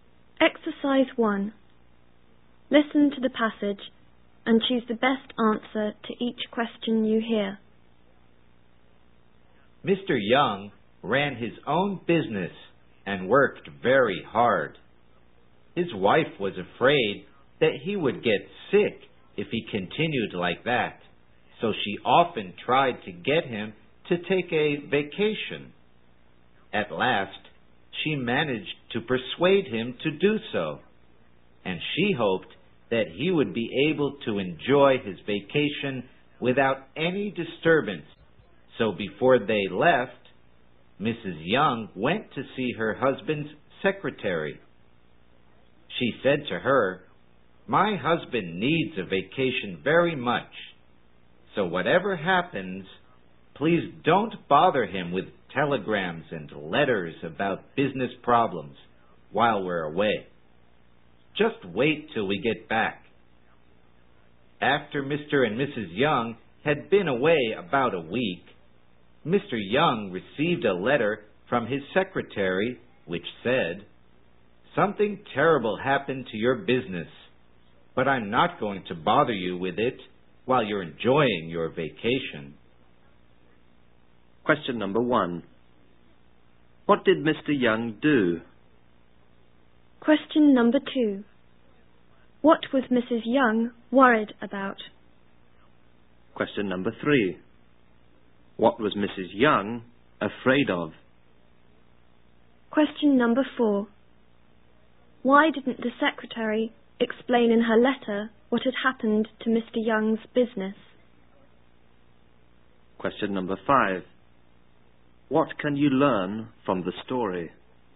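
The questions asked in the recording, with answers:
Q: What did Mr. Young do?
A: He ran his own business

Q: What was Mrs. Young worried about?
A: That her husband would get sick from working too hard

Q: Why didn't the secretary explain in her letter what had happened to Mr. Young's business?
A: She was told not to bother him with business problems during his vacation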